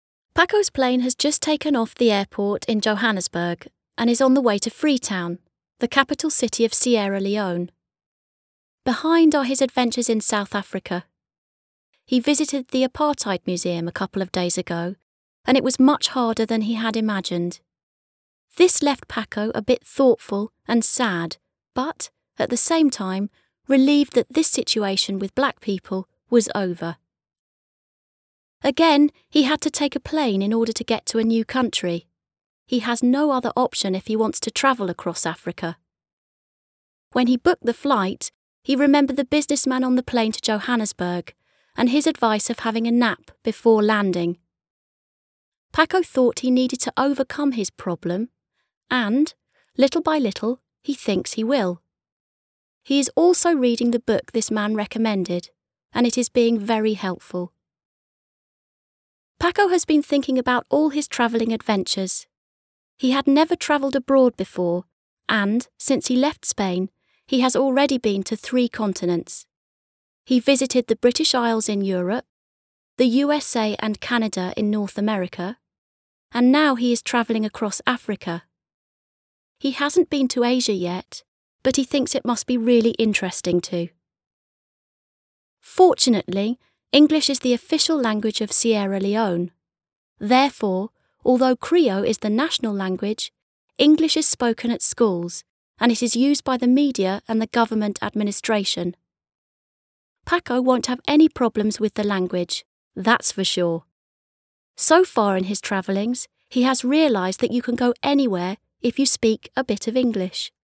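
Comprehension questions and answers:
Read the text again and decide if the following statements are true or false:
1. Paco is already in Sierra Leone.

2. Freetown is the capital city of Sierra Leone.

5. People in Sierra Leone don't speak English.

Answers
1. Falso
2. Verdadero
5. Falso

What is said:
Paco's plane has just taken off the airport in Johannesburg and is on the way to Freetown, the capital city of Sierra Leone. Behind are his adventures in South Africa. He visited the Apartheid Museum a couple of days ago and it was much harder than he had imagined. This left Paco a bit thoughtful and sad but, at the same time, relieved that this situation with black people was over.
Again, he had to take a plane in order to get to a new country. He has no other option if he wants to travel across Africa. When he booked the flight, he remembered the businessman on the plane to Johannesburg and his advice of having a nap before landing. 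Paco thought he needed to overcome his "problem" and, little by little, he thinks he will. He's also reading the book this man recommended and it is being very helpful.
Paco has been thinking about all his travelling adventures: he had never travelled abroad before and, since he left Spain, he has already been to three continents. He has visited the British Isles in Europe, the USA and Canada in North America, and now he is travelling across Africa. He hasn't been to Asia yet but he thinks it must be really interesting too.
Fortunately, English is the official language of Sierra Leone. Therefore, although Krio is the national language, English is spoken at schools, and it is used by the media and the government administration. Paco won't have any problems with the language. That's for sure! So far in his travellings, he has realized that you can go anywhere if you speak a bit of English.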